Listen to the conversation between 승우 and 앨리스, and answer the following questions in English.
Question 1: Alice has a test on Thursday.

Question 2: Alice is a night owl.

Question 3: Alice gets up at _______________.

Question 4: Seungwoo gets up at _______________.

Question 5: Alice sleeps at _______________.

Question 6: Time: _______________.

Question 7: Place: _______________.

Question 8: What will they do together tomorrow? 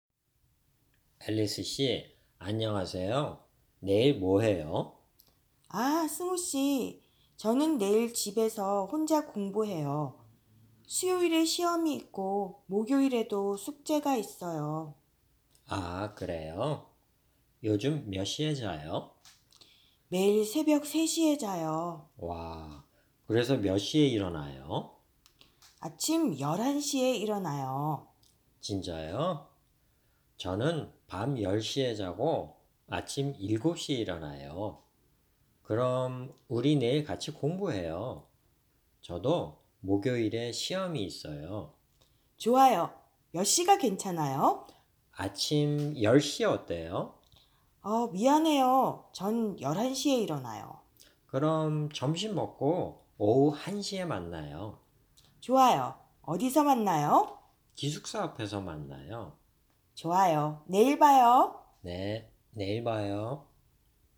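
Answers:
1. False
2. True
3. 11 AM
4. 7 AM
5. 3 AM
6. 1 PM
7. In front of the dormitory
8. Study together (Seungwoo also has a test on Thursday)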